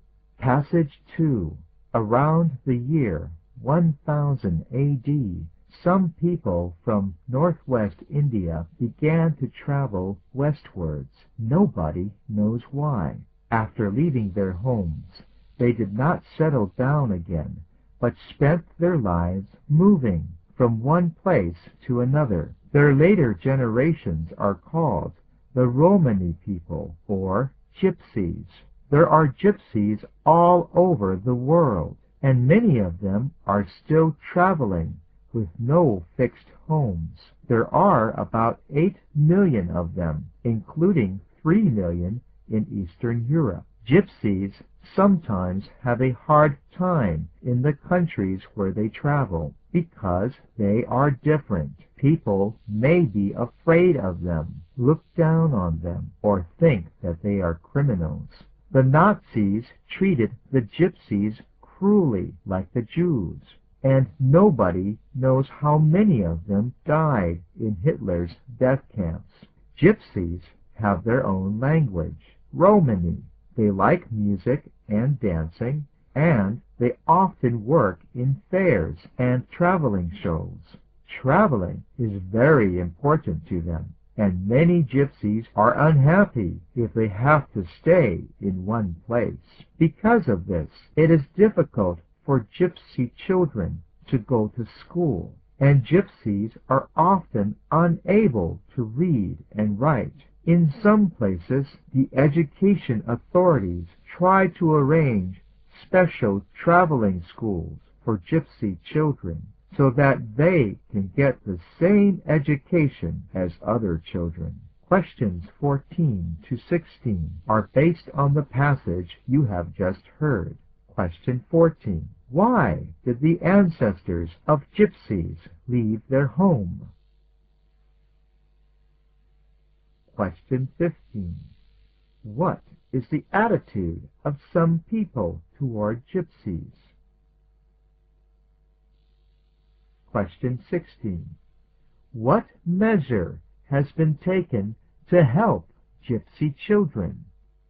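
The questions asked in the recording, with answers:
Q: Why did the ancestors of Gypsies leave their home?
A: Nobody knows why

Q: What is the attitude of some people toward Gypsies?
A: They fear them, look down on them or think they are criminals

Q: What measure has been taken to help Gypsy children?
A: Special traveling schools have been arranged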